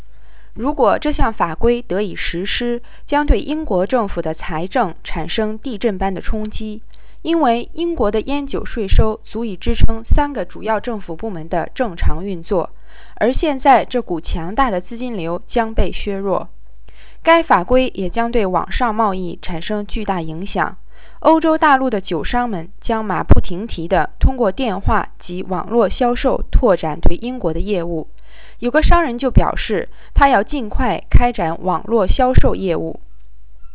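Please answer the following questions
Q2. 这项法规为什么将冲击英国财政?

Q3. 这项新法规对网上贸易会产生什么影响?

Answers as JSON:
{"2": "因为英国的烟酒税收足以支撑三个主要政府部门的正常运作,这股资金流将被削弱", "3": "欧洲大陆的酒商将通过电话及网络销售大力拓展对英国的业务"}

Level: 3rd Year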